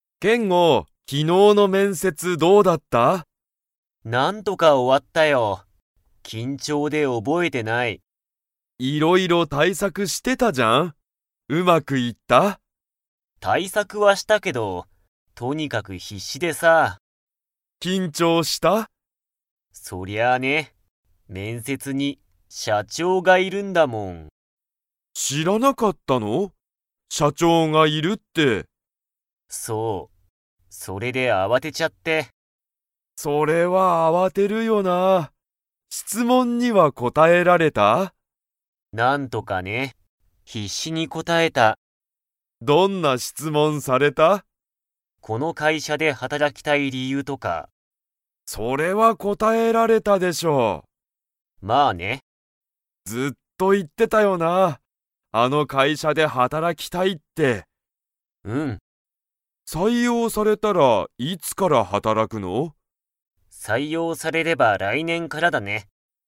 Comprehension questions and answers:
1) 面接めんせつには、誰だれがいましたか?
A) ユウジ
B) 先生せんせい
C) 親おや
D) 社長しゃちょう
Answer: 社長しゃちょう

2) ケンゴは、この会社かいしゃで働はたらきたいと 。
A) ずっと言いってた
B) 一度いちども言いわなかった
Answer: ずっと言いってた

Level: Level 4

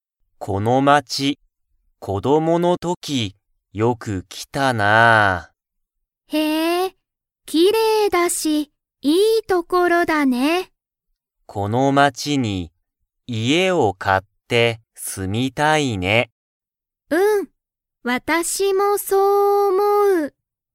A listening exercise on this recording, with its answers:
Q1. マコトとユカはこの街(まち)で、____を買(か)いたい。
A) 家族(かぞく)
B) 本(ほん)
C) 家(いえ)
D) 写真(しゃしん)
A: 家(いえ)

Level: Level 1

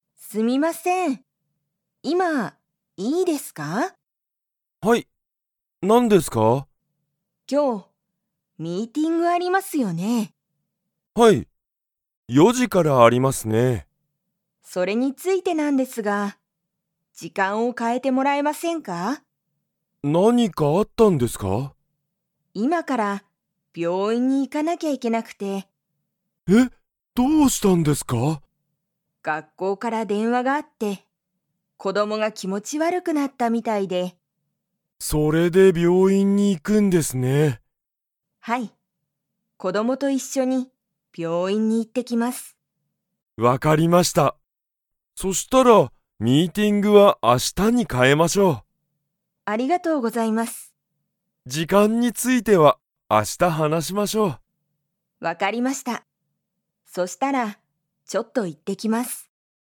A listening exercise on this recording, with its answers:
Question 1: ____が気持きもち悪わるくなった。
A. 松井まついさん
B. 松井まついさんの子供こども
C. 斎藤さいとうさん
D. 斎藤さいとうさんの学校がっこう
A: 松井まついさんの子供こども

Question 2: 松井まついさんは、今日病院きょうびょういんに行いきますか?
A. はい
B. いいえ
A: はい

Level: Level 2

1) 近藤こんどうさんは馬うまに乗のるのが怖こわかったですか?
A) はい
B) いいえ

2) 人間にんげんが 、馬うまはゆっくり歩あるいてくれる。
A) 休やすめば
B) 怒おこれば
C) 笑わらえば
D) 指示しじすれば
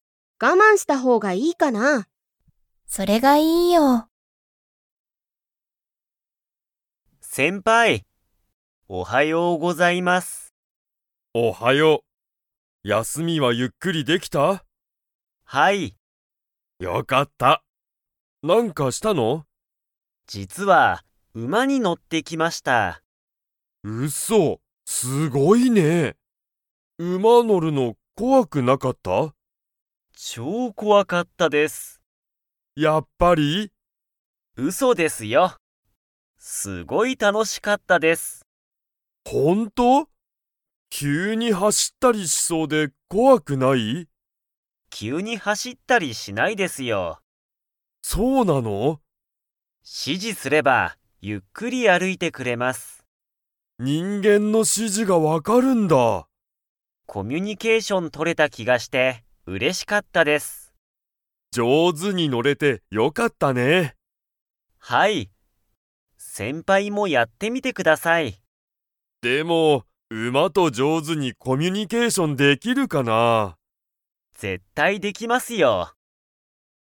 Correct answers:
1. いいえ
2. 指示しじすれば

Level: Level 4

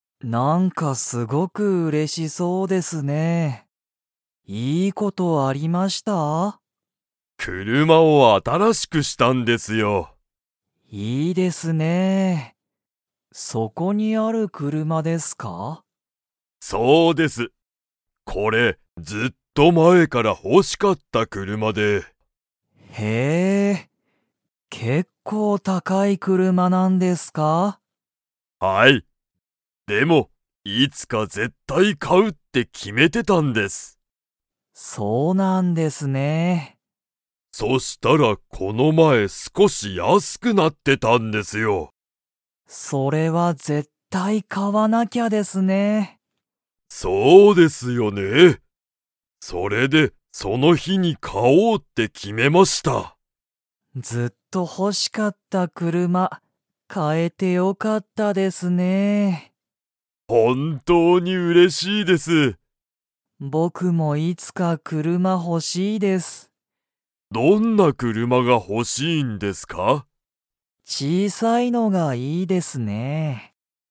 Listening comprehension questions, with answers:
Comprehension Quiz (Skip if you don't understand the conversation yet)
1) 大西おおにしさんは、その車くるまを____買かうって決きめていた。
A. いつか絶対ぜったい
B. この前少まえすこし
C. なんかちょっと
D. よく後あとに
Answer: いつか絶対ぜったい

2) 小島こじまさんは、いつか車くるまが欲ほしいですか?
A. はい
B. いいえ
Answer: はい

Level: Level 2

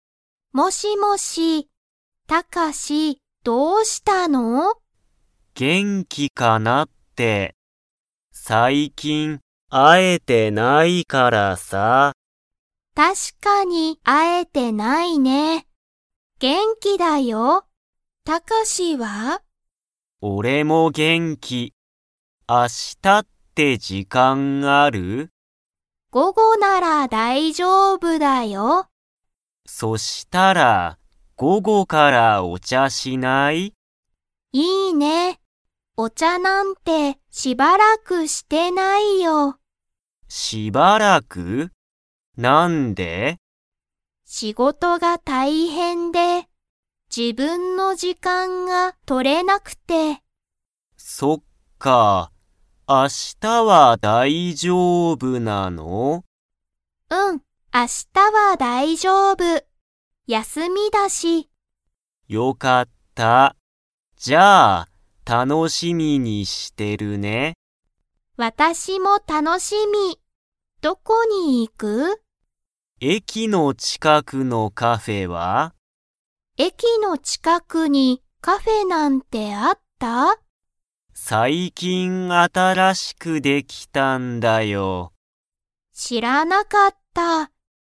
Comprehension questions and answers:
Comprehension Quiz (Skip if you don't understand the conversation yet)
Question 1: リエとタカシは、最近さいきん 。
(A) よく会あってる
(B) 会あってない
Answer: 会あってない

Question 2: リエとタカシは、どこのカフェに行いきますか?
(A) 駅えきの近ちかく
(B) 駅えきの中なか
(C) 会社かいしゃの近ちかく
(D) 会社かいしゃの中なか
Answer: 駅えきの近ちかく

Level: Level 3

